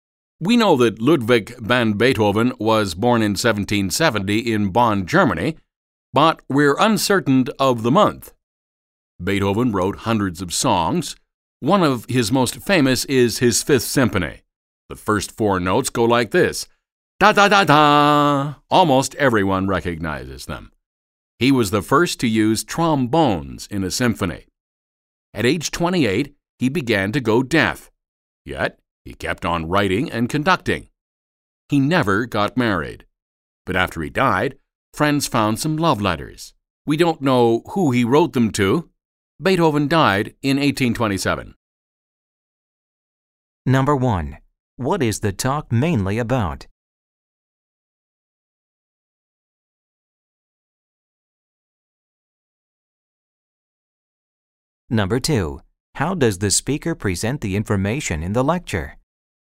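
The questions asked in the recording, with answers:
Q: What is the talk mainly about?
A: The life of Ludwig van Beethoven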